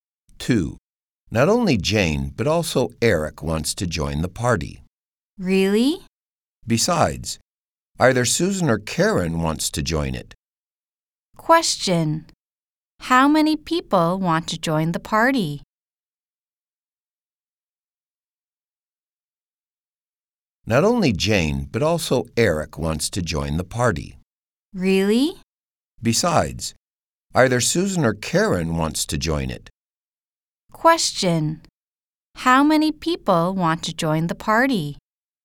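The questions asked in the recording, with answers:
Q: How many people want to join the party?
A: Three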